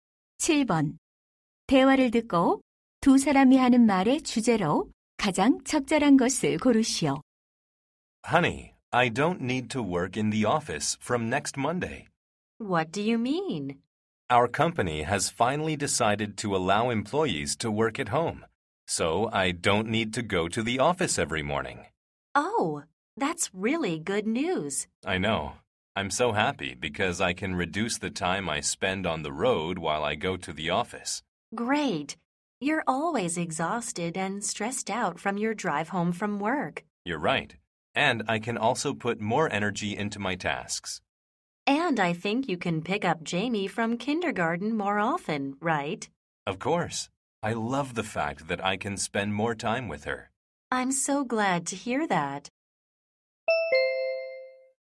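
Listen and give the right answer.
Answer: 재택근무의 장점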